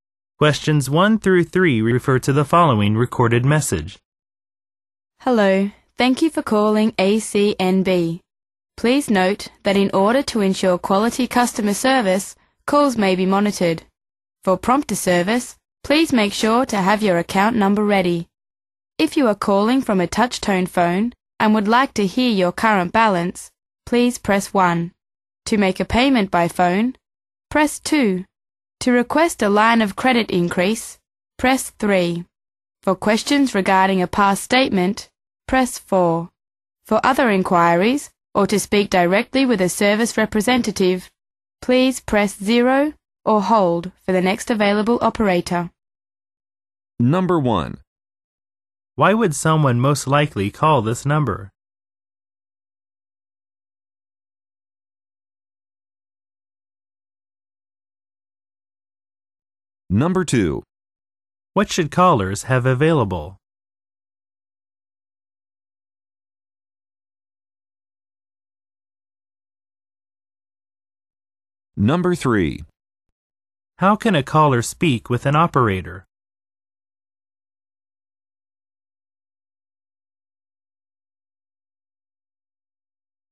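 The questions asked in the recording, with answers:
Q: What should callers have available?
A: Their account number

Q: How can a caller speak with an operator?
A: Press 0 or hold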